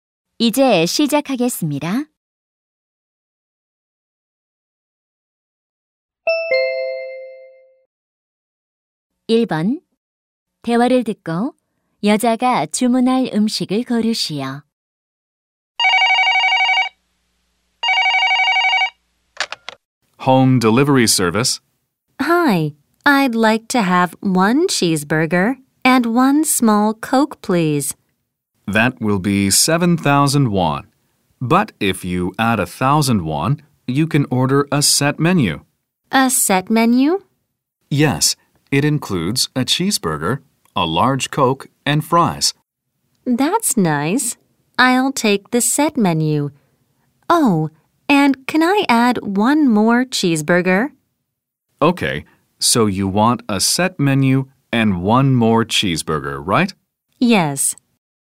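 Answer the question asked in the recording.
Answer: 세트 메뉴(치즈버거, 큰 콜라, 감자튀김)와 치즈버거 한 개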